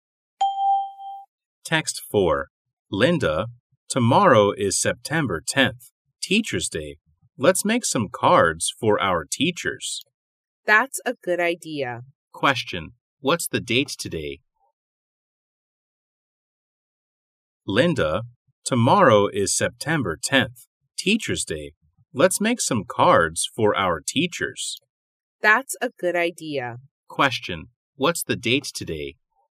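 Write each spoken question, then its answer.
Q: What's the date today?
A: September 9th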